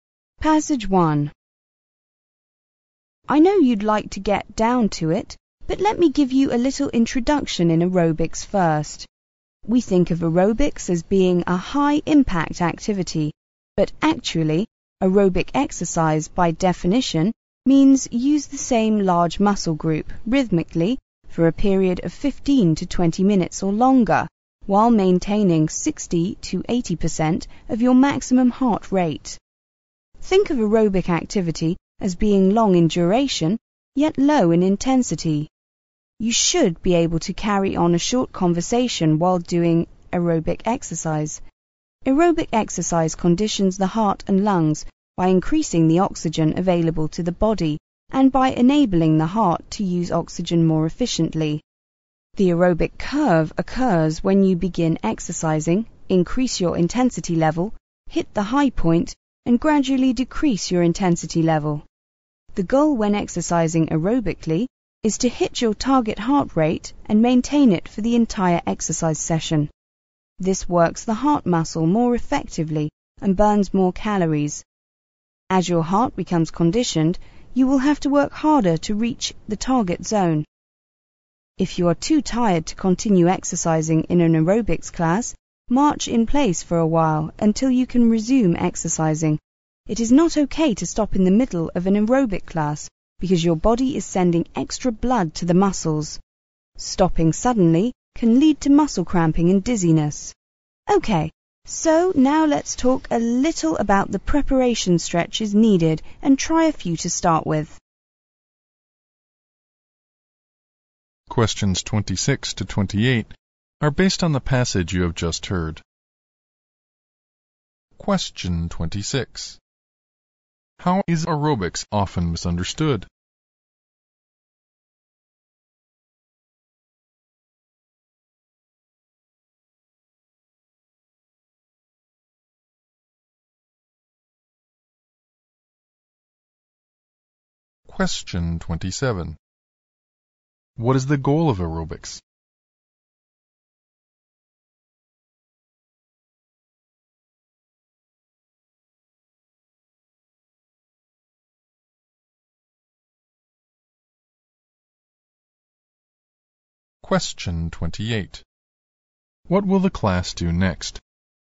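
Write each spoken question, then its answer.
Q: How is aerobics often misunderstood?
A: As a high-impact activity

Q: What is the goal of aerobics?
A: To hit your target heart rate and keep it there for the whole exercise session

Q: What will the class do next?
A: Try some preparation stretches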